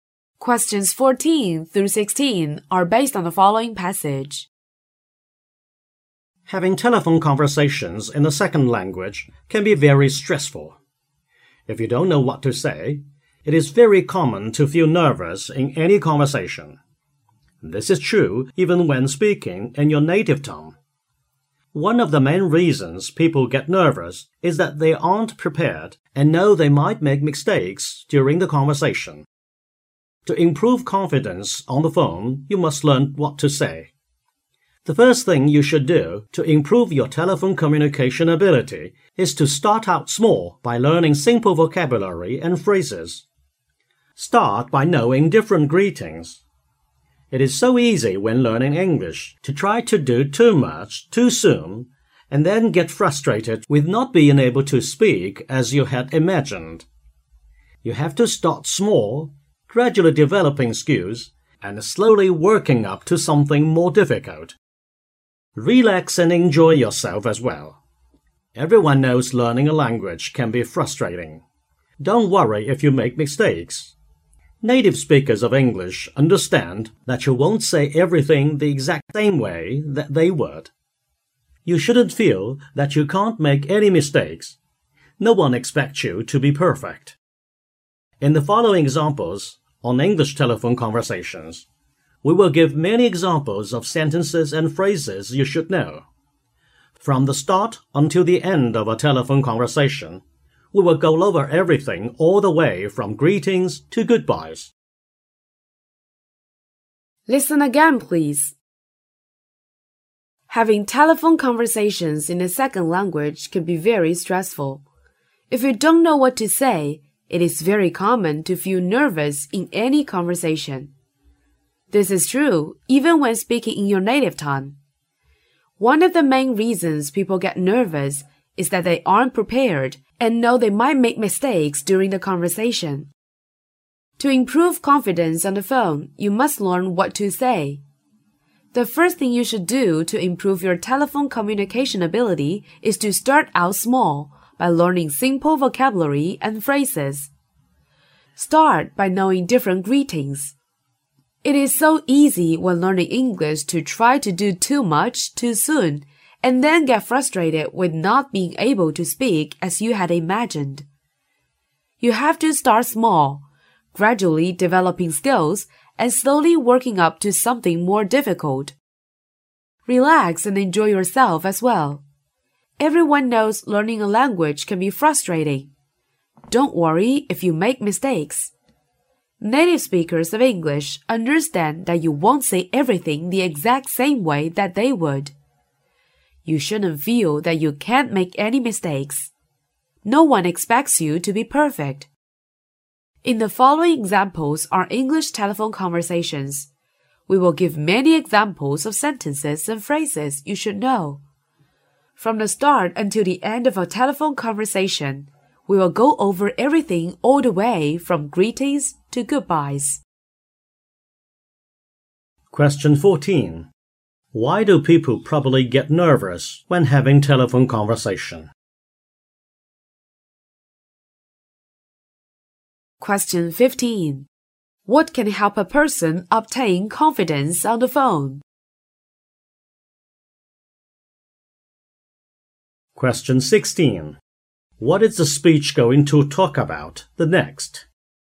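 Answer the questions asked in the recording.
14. They aren't prepared and know they might make mistakes.
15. Learning what to say, starting with simple vocabulary and phrases
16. Examples of English telephone conversations, from greetings to goodbyes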